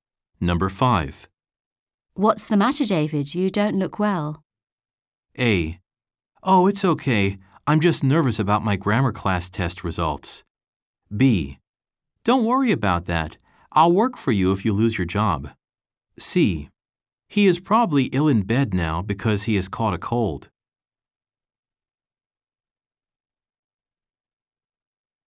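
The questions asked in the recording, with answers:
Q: What's the matter, David? You don't look well.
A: A: Oh, it's okay. I'm just nervous about my grammar class test results.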